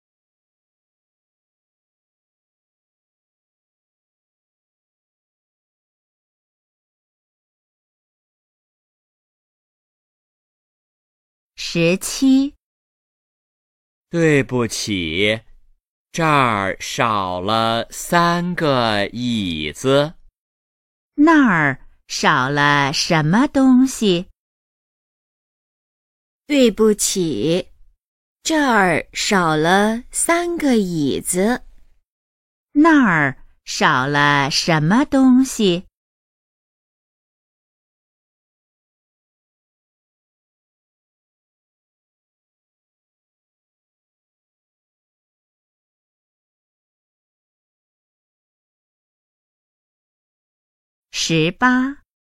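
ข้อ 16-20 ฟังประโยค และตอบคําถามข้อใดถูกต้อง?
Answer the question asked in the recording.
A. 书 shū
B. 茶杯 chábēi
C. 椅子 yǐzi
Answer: C. 椅子 yǐzi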